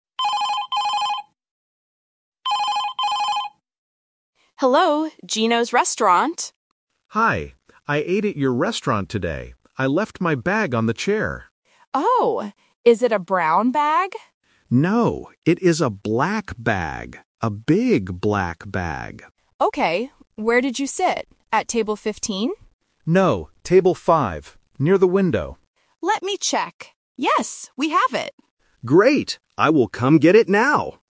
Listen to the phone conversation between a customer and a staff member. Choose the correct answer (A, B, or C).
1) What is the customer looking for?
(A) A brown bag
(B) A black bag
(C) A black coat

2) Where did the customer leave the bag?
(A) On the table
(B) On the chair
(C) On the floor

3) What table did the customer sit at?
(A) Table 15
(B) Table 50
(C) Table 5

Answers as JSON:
{"1": "B", "2": "B", "3": "C"}

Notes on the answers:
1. The customer clearly says, "No, it is a black bag. A big black bag."
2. The customer states, "I left my bag on the chair."
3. The customer corrects the staff and says, "No, table 5."

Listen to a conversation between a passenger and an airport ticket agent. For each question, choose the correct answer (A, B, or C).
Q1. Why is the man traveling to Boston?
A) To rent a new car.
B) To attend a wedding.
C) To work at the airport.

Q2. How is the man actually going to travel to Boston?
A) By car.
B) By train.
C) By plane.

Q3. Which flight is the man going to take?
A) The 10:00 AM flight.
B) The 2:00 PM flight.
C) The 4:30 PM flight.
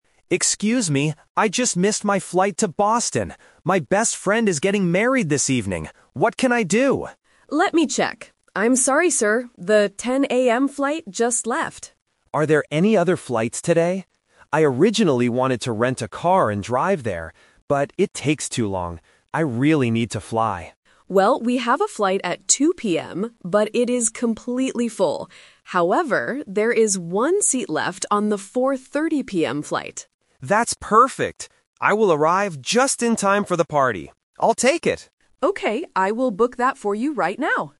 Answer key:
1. B
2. C
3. C

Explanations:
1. The man says, "My best friend is getting married this evening" (Option B - Key). Option A is a trap because he mentions renting a car later, but that is not the purpose of his trip. Option C is a logical guess for an airport setting but is not mentioned.
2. The man says he "originally wanted to rent a car" (Option A - Trap). However, he changes his mind because it takes too long and says, "I really need to fly," which means traveling by plane (Option C - Key). Option B is not mentioned.
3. This question tests three different times. The 10:00 AM flight is the one he missed (Option A - Trap). The 2:00 PM flight is full (Option B - Trap). The agent says there is one seat left on the 4:30 PM flight, and the man says "I'll take it!" (Option C - Key).

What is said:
Passenger: Excuse me, I just missed my flight to Boston! My best friend is getting married this evening. What can I do?
Agent: Let me check. I'm sorry, sir. The 10:00 AM flight just left.
Passenger: Are there any other flights today? I originally wanted to rent a car and drive there. But, it takes too long. I really need to fly.
Agent: Well, we have a flight at 2:00 PM, but it is completely full. However, there is one seat left on the 4:30 PM flight.
Passenger: That's perfect. I will arrive just in time for the party. I'll take it!

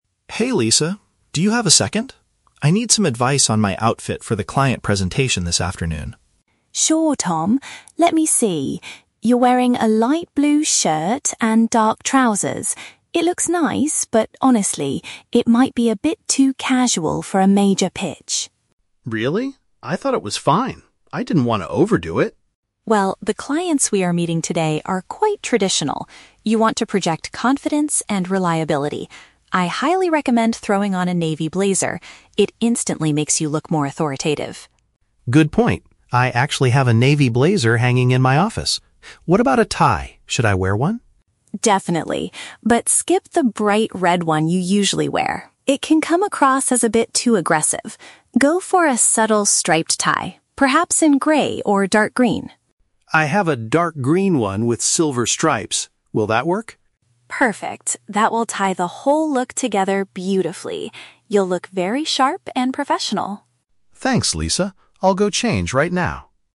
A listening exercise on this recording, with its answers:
Listen to the conversation between two colleagues. For each question, choose the correct answer (A, B, or C).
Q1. What is Lisa's main concern about Tom's current clothing?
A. It is not formal enough for an important meeting.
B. It does not match the traditional style of their office.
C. It is too uncomfortable to wear during a long speech.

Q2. What piece of clothing does Lisa suggest Tom add to his outfit first?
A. A brand new light blue shirt.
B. A dark-colored jacket.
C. A pair of smart trousers.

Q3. Why does Lisa advise against wearing the red tie?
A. It might give off a hostile or overly strong impression.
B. It clashes with the pattern on his new shirt.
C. It is generally considered outdated by their clients.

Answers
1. A
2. B
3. A

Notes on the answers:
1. Lisa says his outfit is "a bit too casual for a major pitch," which means it is not formal enough. Option B is a trap because the word "traditional" is mentioned, but Lisa uses it to describe the clients, not the office. Option C is plausible but never mentioned in the audio.
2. Lisa recommends "throwing on a navy blazer." A navy blazer is paraphrased as a "dark-colored jacket." Option A is a trap because Tom is already wearing a light blue shirt; he isn't adding it. Option C is a trap because he is already wearing dark trousers.
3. Lisa says the red tie can "come across as a bit too aggressive," which is paraphrased as a "hostile or overly strong impression." Option B is a trap because "stripes" are mentioned later, but Lisa suggests a striped tie, not a striped shirt. Option C is plausible but not the reason she gives.

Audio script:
Tom: Hey Lisa, do you have a second? I need some advice on my outfit for the client presentation this afternoon.
Lisa: Sure, Tom. Let me see... You're wearing a light blue shirt and dark trousers. It looks nice, but honestly, it might be a bit too casual for a major pitch.
Tom: Really? I thought it was fine. I didn't want to overdo it.
Lisa: Well, the clients we are meeting today are quite traditional. You want to project confidence and reliability. I highly recommend throwing on a navy blazer. It instantly makes you look more authoritative.
Tom: Good point. I actually have a navy blazer hanging in my office. What about a tie? Should I wear one?
Lisa: Definitely. But skip the bright red one you usually wear. It can come across as a bit too aggressive. Go for a subtle striped tie, perhaps in grey or dark green.
Tom: I have a dark green one with silver stripes. Will that work?
Lisa: Perfect! That will tie the whole look together beautifully. You'll look very sharp and professional.
Tom: Thanks, Lisa. I'll go change right now.

